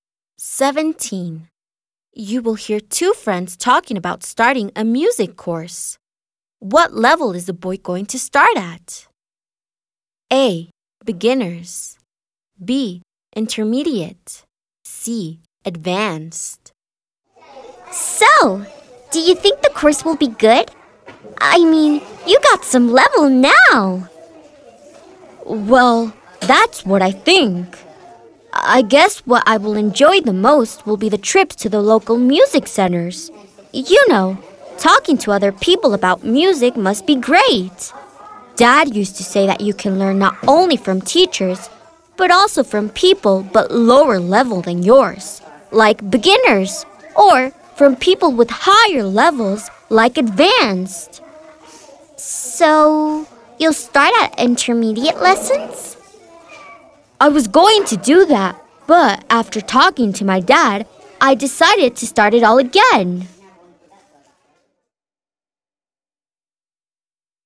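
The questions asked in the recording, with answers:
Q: What level is the boy going to start at?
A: A: Beginners.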